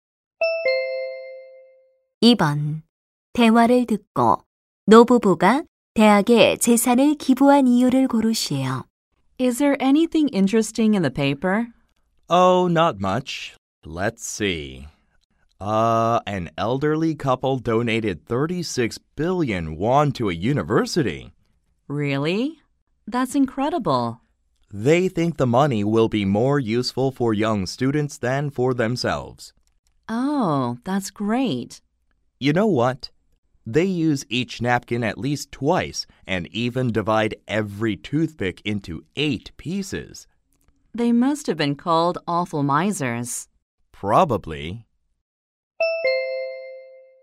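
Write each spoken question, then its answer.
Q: 대화를 듣고 노부부가 대학에 재산을 기부한 이유를 고르시오.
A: 돈이 자신들보다 젊은 학생들에게 더 유용할 것이라고 생각해서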